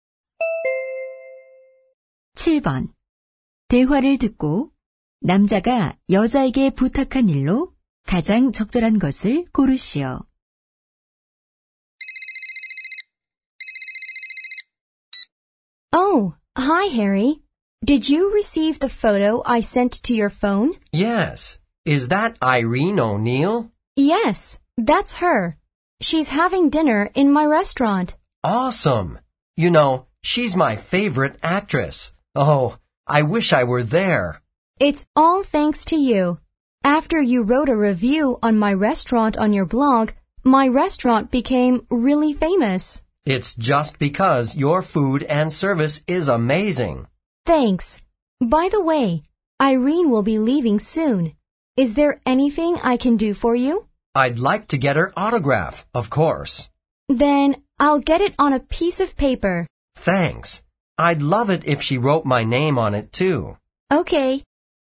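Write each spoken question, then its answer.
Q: 대화를 듣고 남자가 여자에게 부탁한 일로 가장 적절한 것을 고르시오.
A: 여배우의 사인 받아주기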